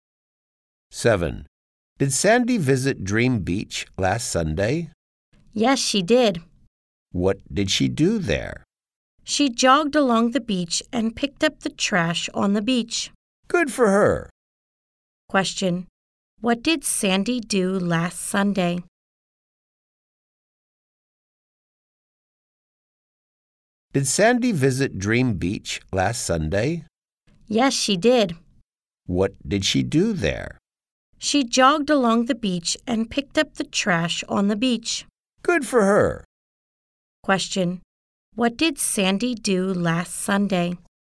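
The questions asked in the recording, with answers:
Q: What did Sandy do last Sunday?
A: She jogged along the beach and picked up trash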